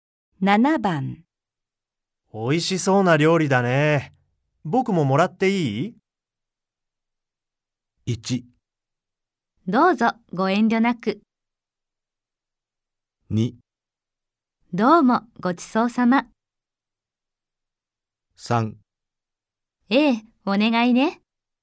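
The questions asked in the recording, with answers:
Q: おいしそうな料理だね。僕ももらっていい?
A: 1: どうぞご遠慮なく。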